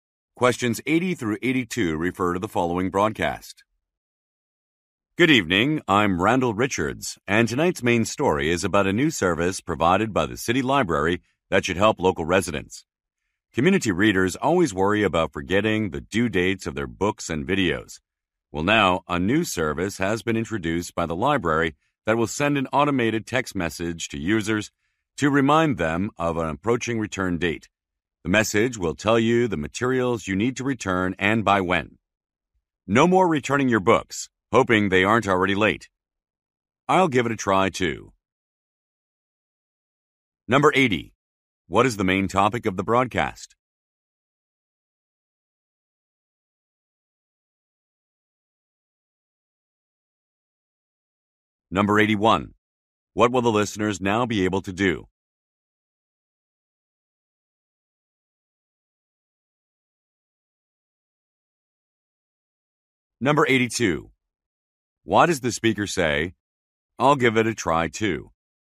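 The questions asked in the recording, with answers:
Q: What is the main topic of the broadcast?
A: A new library service

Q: What will the listeners now be able to do?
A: Receive text message reminders of return due dates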